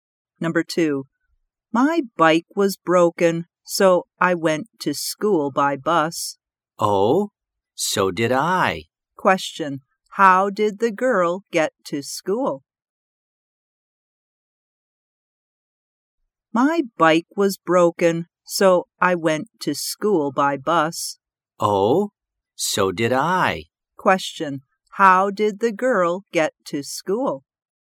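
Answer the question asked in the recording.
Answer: By bus.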